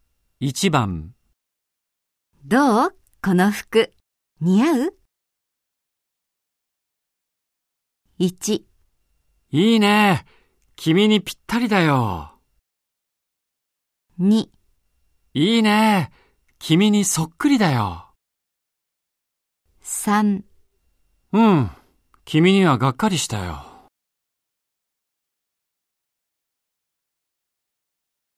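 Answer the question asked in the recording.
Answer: 1: いいね。君にぴったりだよ。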